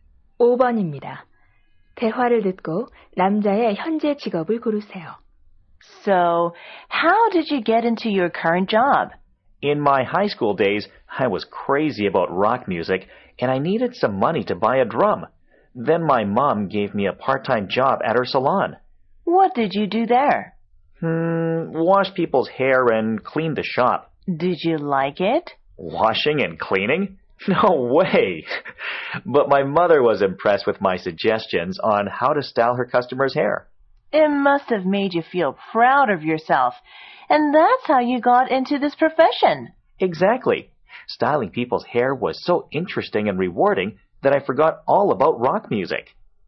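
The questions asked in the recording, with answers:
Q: 대화를 듣고 남자의 현재 직업을 고르세요.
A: 미용사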